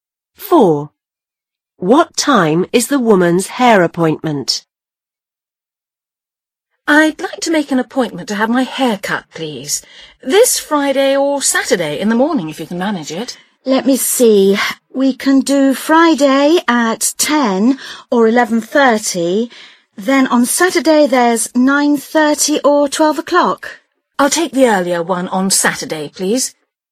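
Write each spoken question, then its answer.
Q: What time is the woman's hair appointment?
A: 9:30 on Saturday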